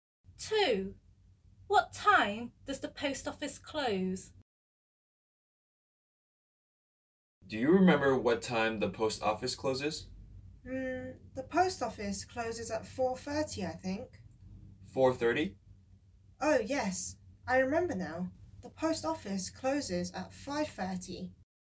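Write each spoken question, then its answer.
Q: What time does the post office close?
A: 5:30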